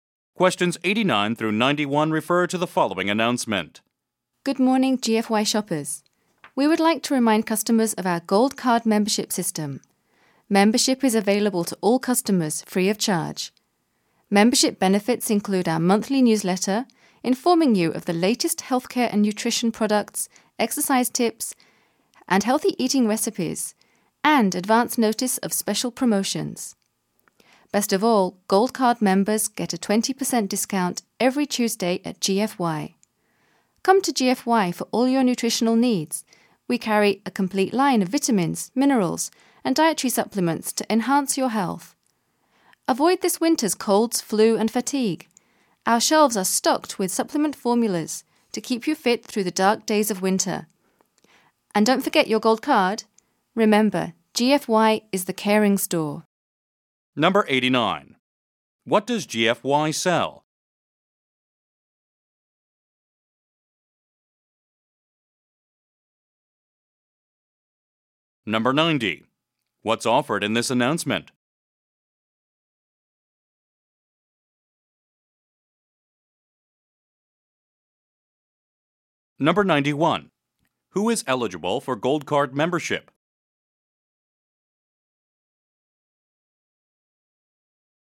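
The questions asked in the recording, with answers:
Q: What does GFY sell?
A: Health and nutrition products such as vitamins and supplements

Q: What's offered in this announcement?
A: Gold Card membership

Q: Who is eligible for Gold Card membership?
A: All customers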